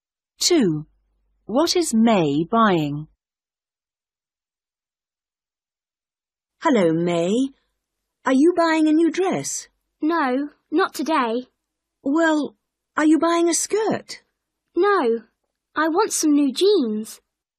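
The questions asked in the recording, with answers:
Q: What is May buying?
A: new jeans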